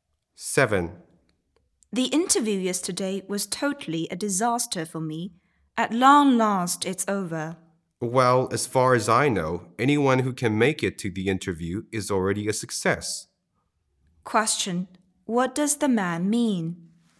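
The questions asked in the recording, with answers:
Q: What does the man mean?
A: Getting the interview is already a success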